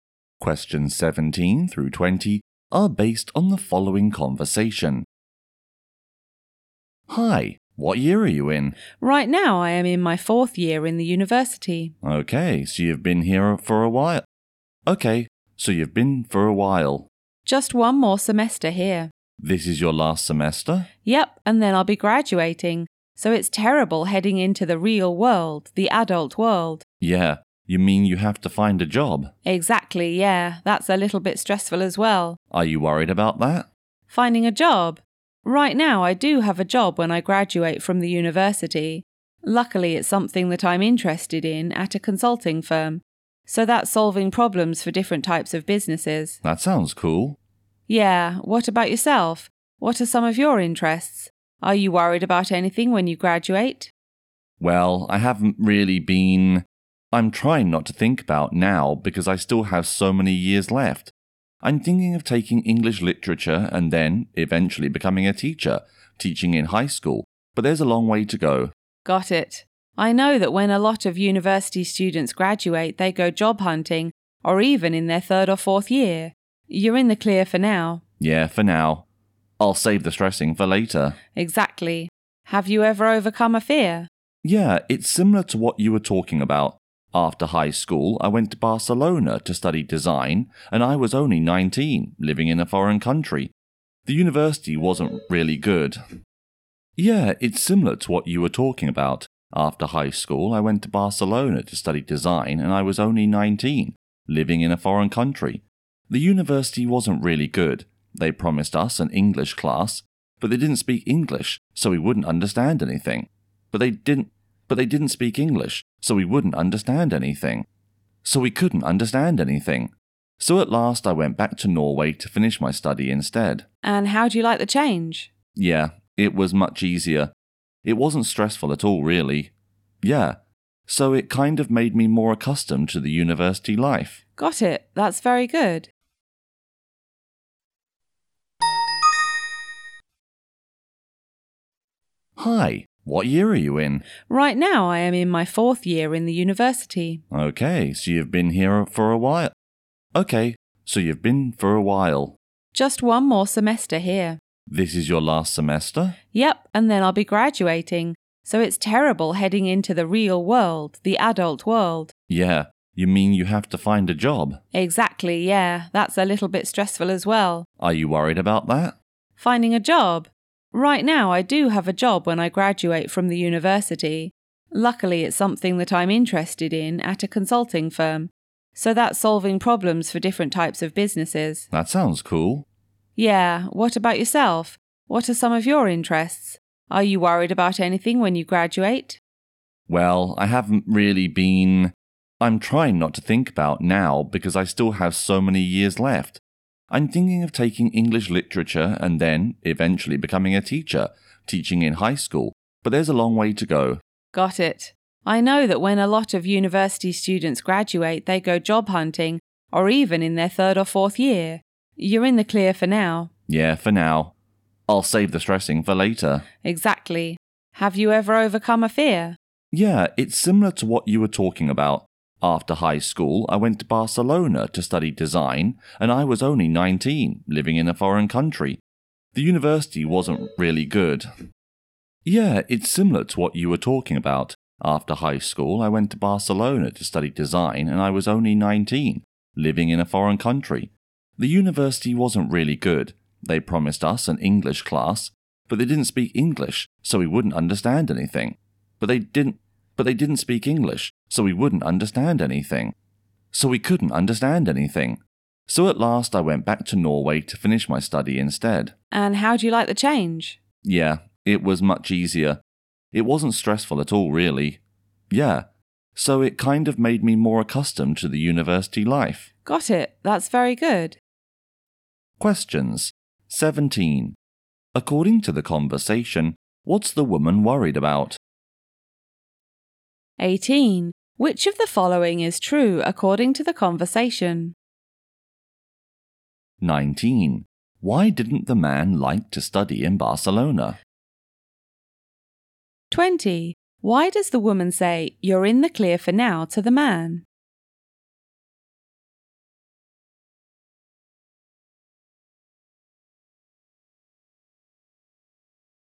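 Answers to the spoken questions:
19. The university wasn't good; the promised English class wasn't in English
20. He still has years left, so he doesn't need to worry about job hunting yet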